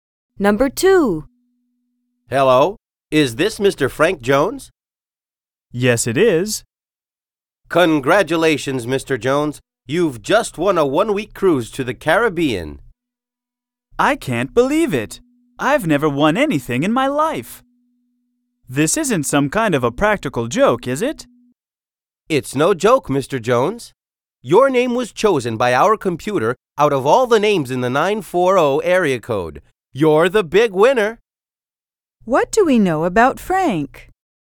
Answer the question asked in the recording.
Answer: He doesn't usually consider himself lucky.